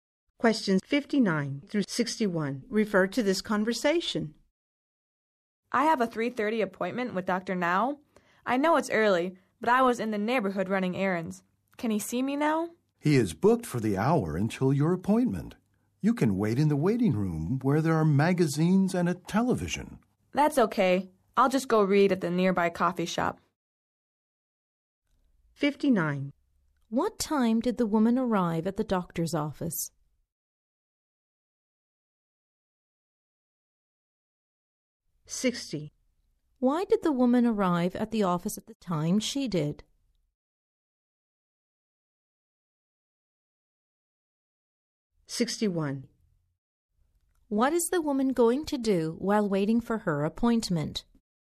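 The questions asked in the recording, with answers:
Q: Why did the woman arrive at the office at the time she did?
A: She was in the neighborhood running errands

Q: What is the woman going to do while waiting for her appointment?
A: Read at the nearby coffee shop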